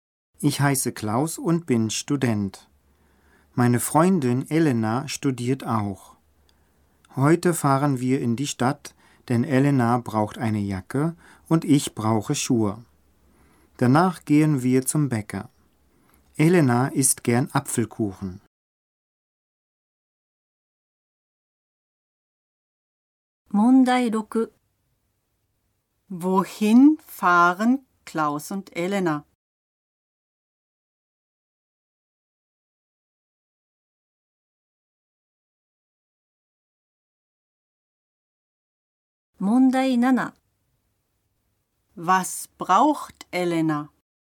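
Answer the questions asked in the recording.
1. In die Stadt
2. Eine Jacke
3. Apfelkuchen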